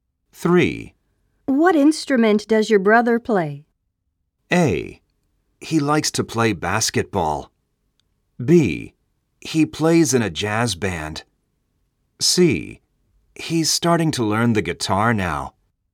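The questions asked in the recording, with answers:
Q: What instrument does your brother play?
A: C: He's starting to learn the guitar now.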